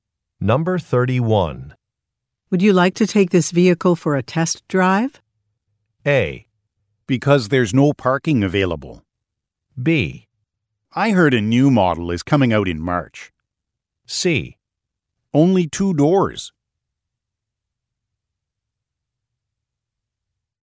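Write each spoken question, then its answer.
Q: Would you like to take this vehicle for a test drive?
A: B: I heard a new model is coming out in March.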